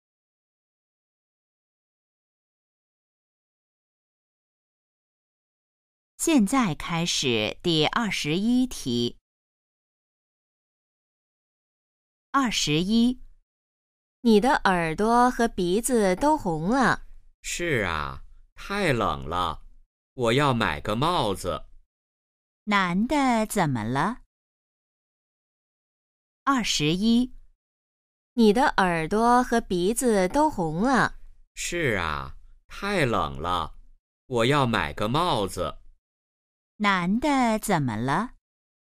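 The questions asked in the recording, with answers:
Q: 男的怎么了?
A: 他很冷,耳朵和鼻子都红了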